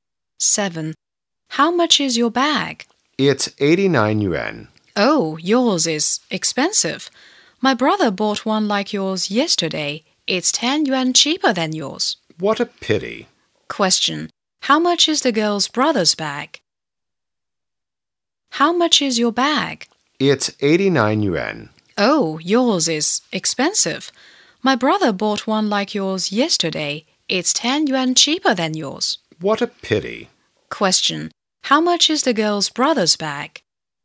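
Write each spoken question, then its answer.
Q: How much is the girl's brother's bag?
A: 79 yuan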